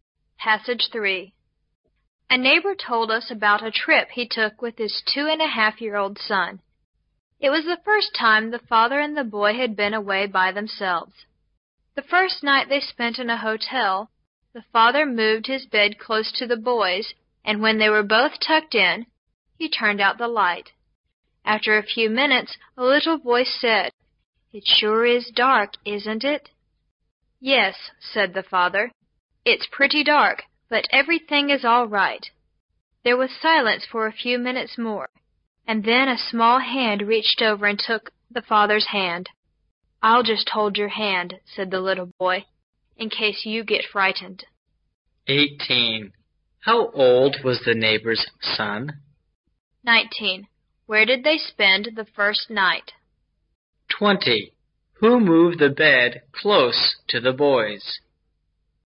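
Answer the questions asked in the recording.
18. 2.5 years old
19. In a hotel
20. The father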